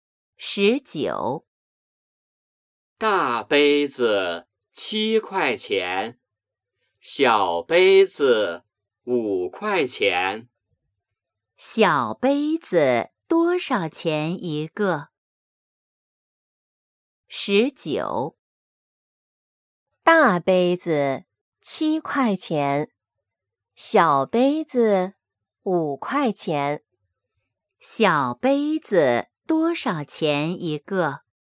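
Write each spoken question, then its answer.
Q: 小杯子多少钱一个?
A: 5块钱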